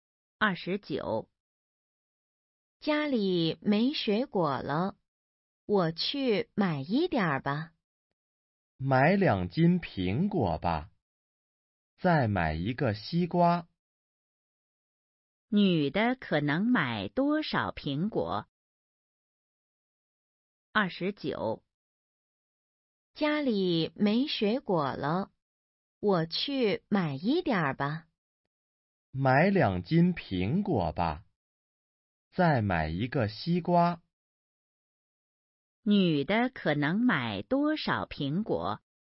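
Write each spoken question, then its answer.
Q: 女的可能买多少苹果?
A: 两斤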